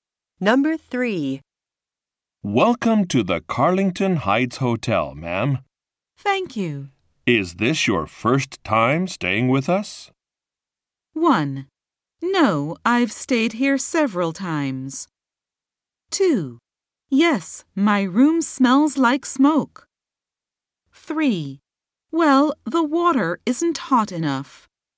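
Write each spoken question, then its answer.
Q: Is this your first time staying with us?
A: 1: No, I've stayed here several times.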